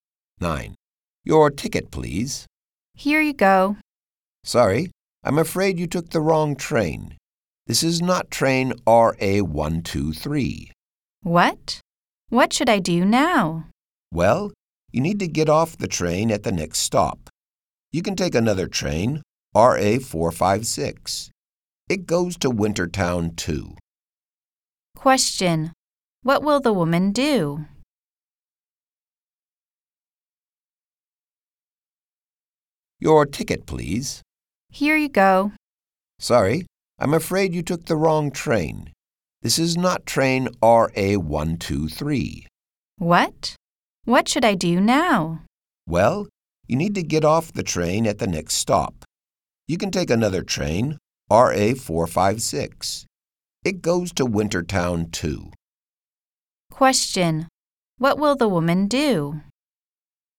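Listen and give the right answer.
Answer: Get off at the next stop and take train RA456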